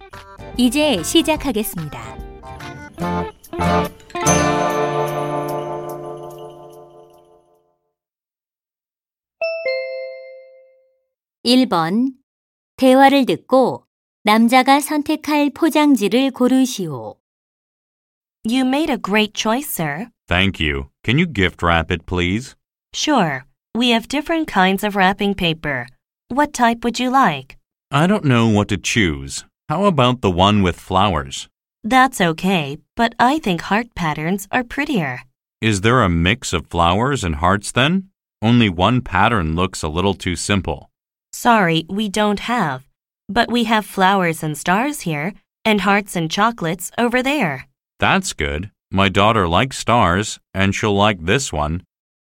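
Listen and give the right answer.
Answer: 꽃과 별 무늬 포장지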